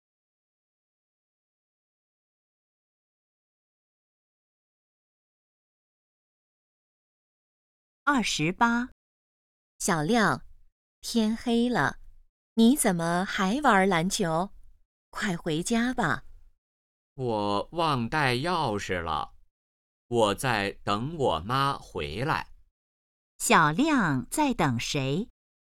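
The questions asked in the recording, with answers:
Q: 小亮在等谁?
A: 他妈妈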